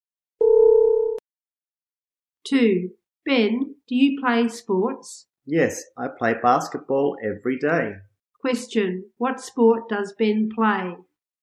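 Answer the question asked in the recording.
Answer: Basketball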